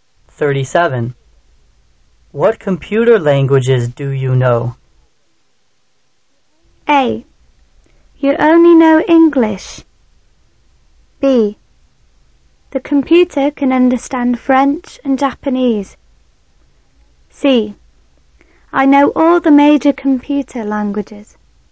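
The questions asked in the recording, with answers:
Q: What computer languages do you know?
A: C: I know all the major computer languages.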